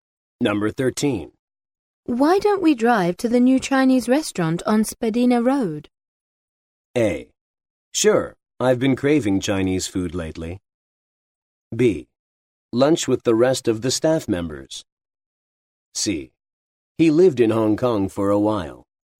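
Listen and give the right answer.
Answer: A: Sure, I've been craving Chinese food lately.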